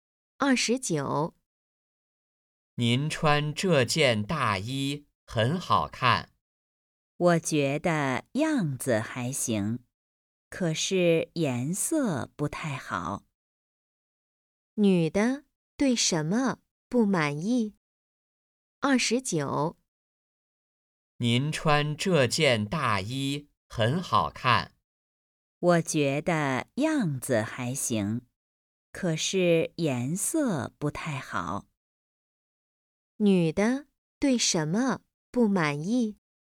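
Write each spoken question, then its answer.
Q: 女的对什么不满意?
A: (大衣的)颜色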